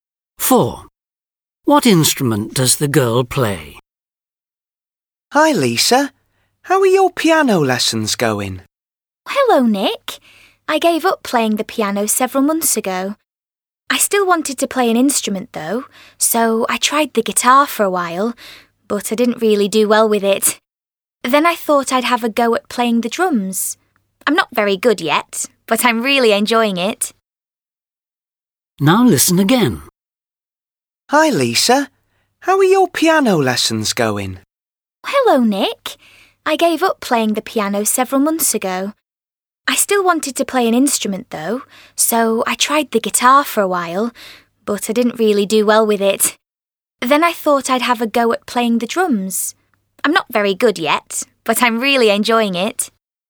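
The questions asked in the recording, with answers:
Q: What instrument does the girl play?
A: The drums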